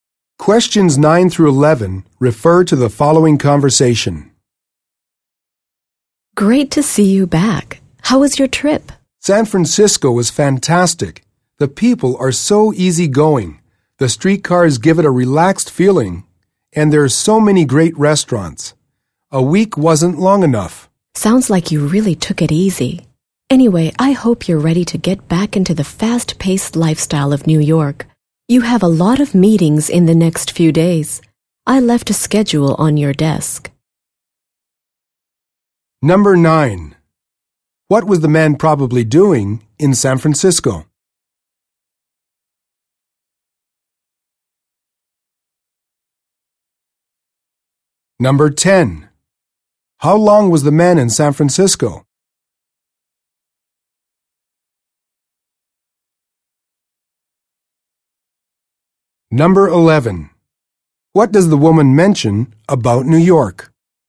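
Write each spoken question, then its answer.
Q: How long was the man in San Francisco?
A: A week

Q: What does the woman mention about New York?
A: It has a fast-paced lifestyle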